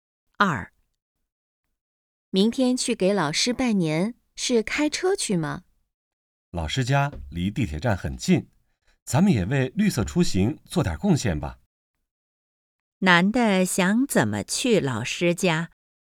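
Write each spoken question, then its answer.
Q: 男的想怎么去老师家?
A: 坐地铁去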